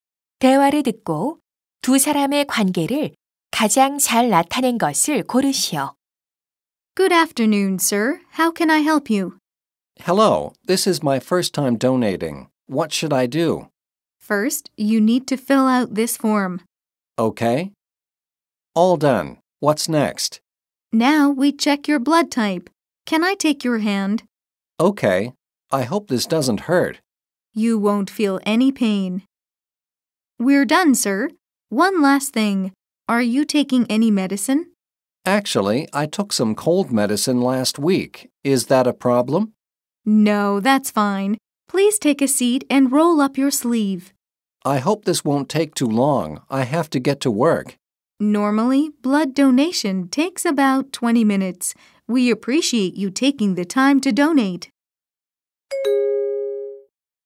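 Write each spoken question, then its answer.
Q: 대화를 듣고 두 사람의 관계를 가장 잘 나타낸 것을 고르시오.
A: 간호사 - 헌혈자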